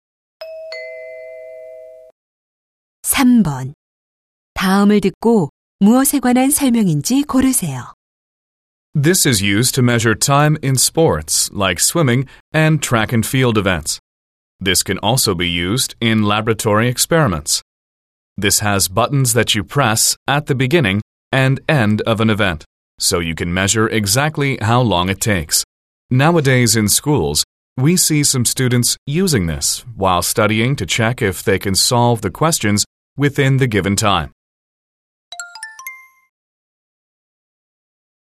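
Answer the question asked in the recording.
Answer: 스톱워치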